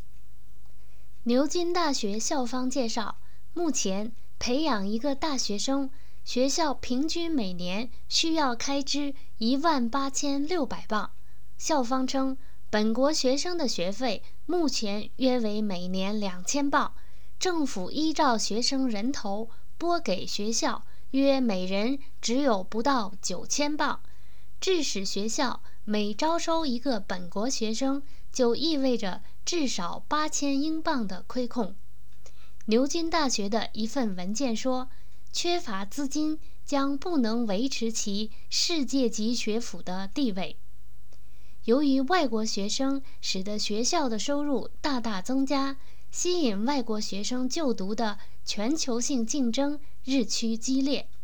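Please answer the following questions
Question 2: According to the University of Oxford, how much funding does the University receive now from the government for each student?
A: Less than £9,000 per student

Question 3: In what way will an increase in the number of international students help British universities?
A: It greatly increases the universities' income

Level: M.Phil Year 2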